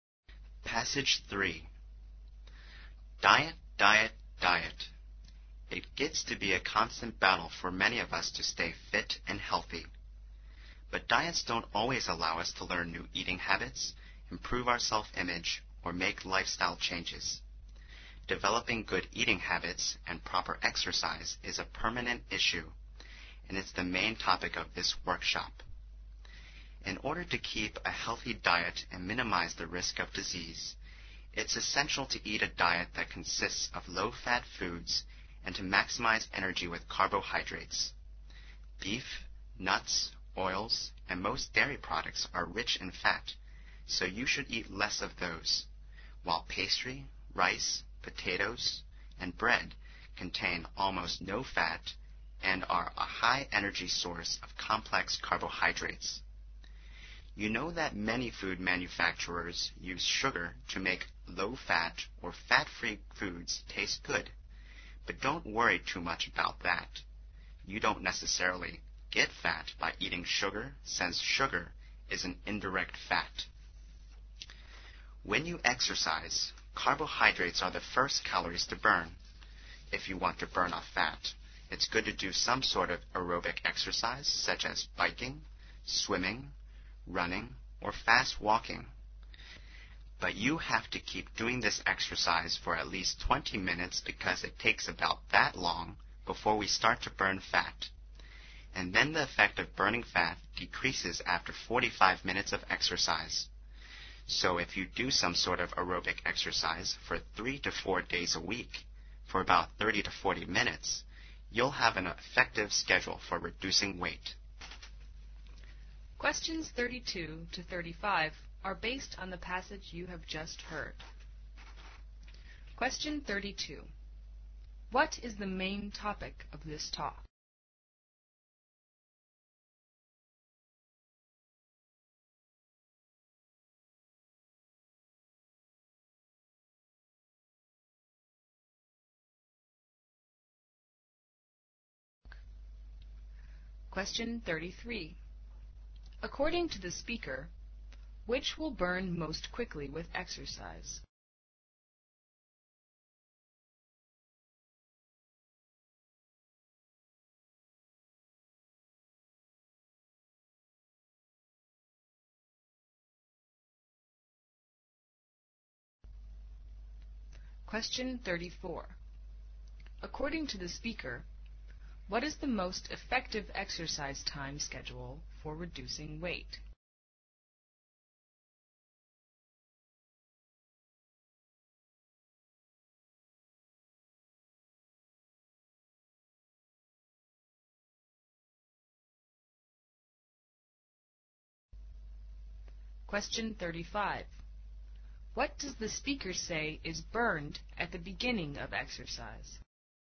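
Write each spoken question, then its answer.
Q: What is the main topic of this talk?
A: Developing good eating habits and proper exercise

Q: According to the speaker, which will burn most quickly with exercise?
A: Carbohydrates

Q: According to the speaker, what is the most effective exercise time schedule for reducing weight?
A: Aerobic exercise 3 to 4 days a week for about 30 to 40 minutes

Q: What does the speaker say is burned at the beginning of exercise?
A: Carbohydrates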